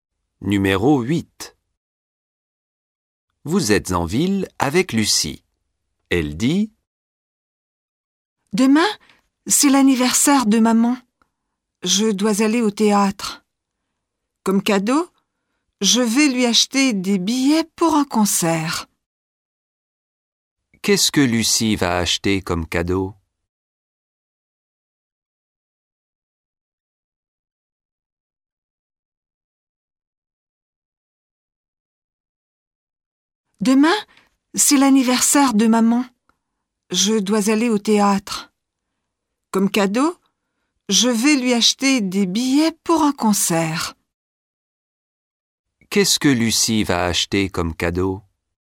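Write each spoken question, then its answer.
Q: Qu'est-ce que Lucie va acheter comme cadeau?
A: Des billets pour un concert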